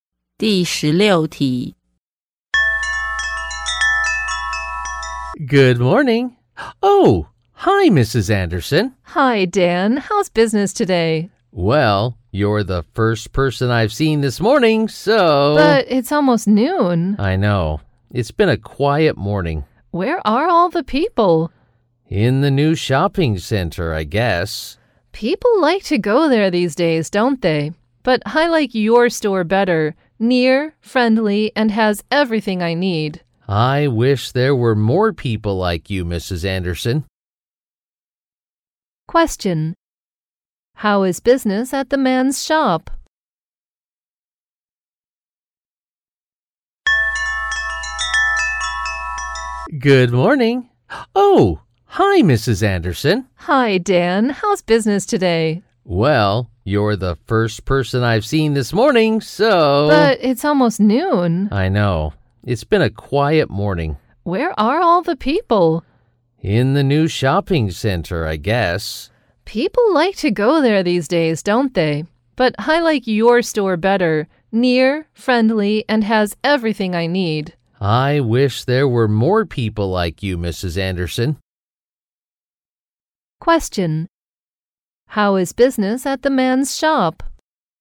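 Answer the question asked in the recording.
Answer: Slow; few customers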